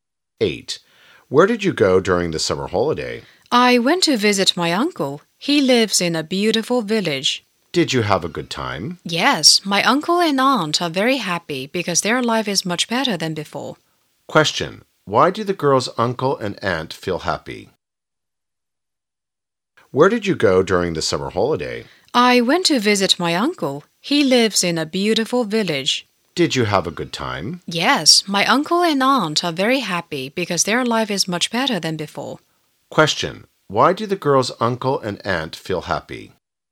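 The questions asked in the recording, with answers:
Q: Why do the girl's uncle and aunt feel happy?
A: Because their life is much better than before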